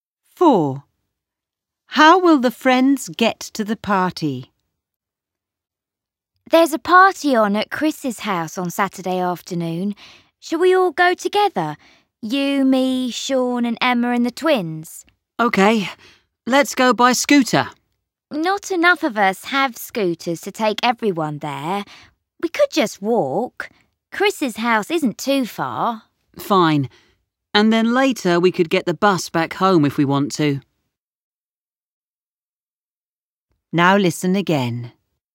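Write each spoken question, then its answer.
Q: How will the friends get to the party?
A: They will walk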